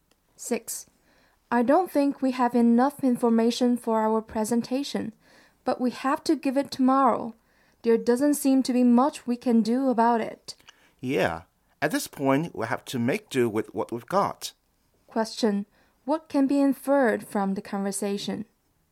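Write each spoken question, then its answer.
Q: What can be inferred from the conversation?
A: They will give the presentation with the information they have.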